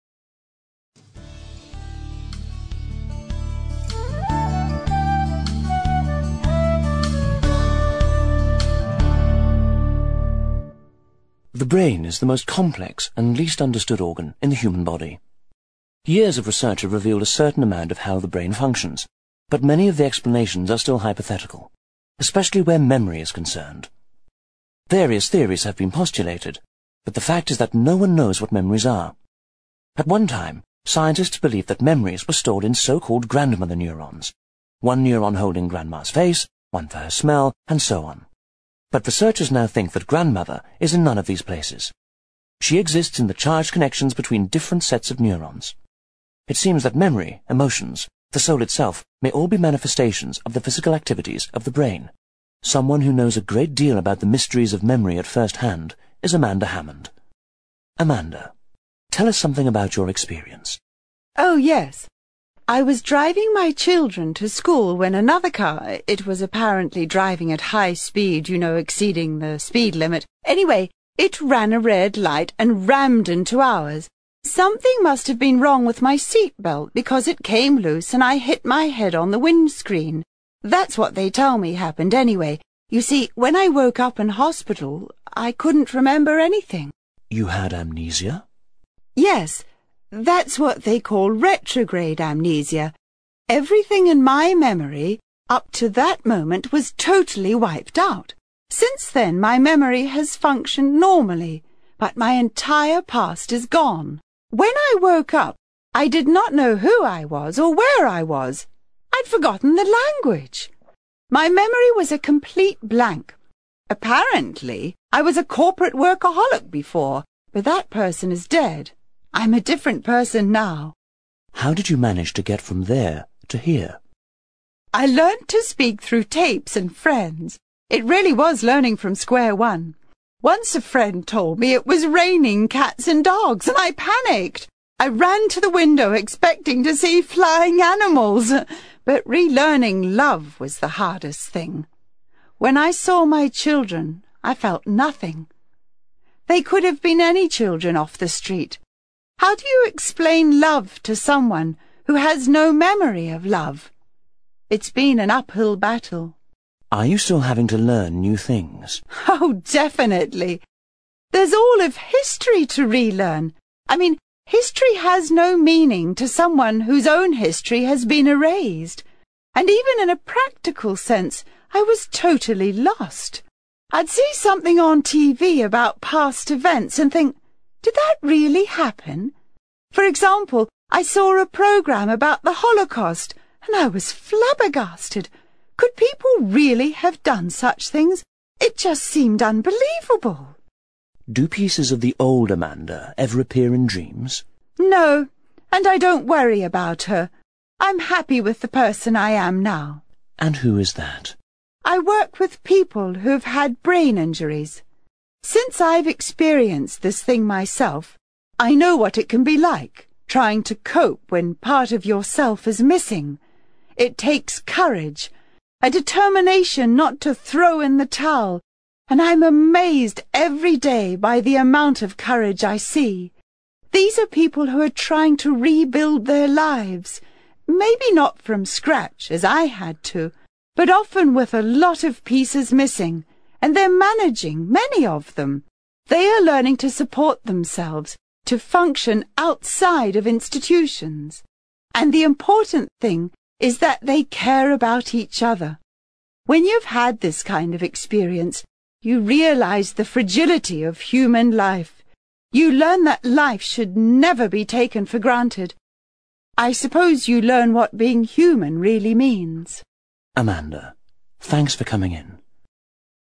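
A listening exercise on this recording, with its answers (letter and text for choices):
You will hear an interview with a woman called Amanda, who suffered from amnesia. After listening, for questions 18-22 choose the answer (A, B, C or D) which fits best according to what you hear.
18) Many explanations of how the brain works are...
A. baffling.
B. theoretical.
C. illogical.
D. absurd.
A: B. theoretical.

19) Before the accident she...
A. was self-employed.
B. spoke a second language.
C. enjoyed working long hours.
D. had a good memory.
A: C. enjoyed working long hours.

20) What is understood from the 'cats and dogs' incident?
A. She had developed a fear of animals.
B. She took everything literally.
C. Her friend enjoyed mocking her.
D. She loved cats and dogs.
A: B. She took everything literally.

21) When she saw the programme about the Holocaust she...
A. was horrified by human cruelty.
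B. didn't believe it was real.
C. was physically ill.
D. didn't understand what was happening.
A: B. didn't believe it was real.

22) What did her experience teach her?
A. To value being alive.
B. To support other people.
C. To function in an institution.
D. To be a happier person.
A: A. To value being alive.

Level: CPE Proficiency English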